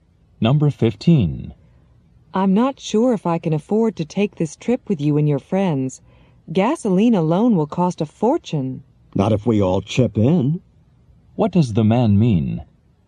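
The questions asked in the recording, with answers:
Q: What does the man mean?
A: If everyone shares the cost, it won't be expensive.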